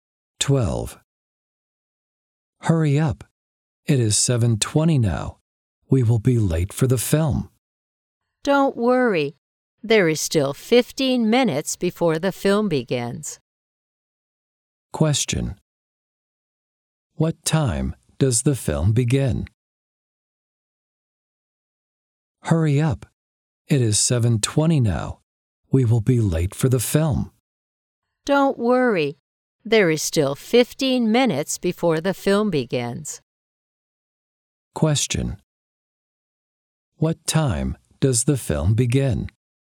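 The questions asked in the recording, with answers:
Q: What time does the film begin?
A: 7:35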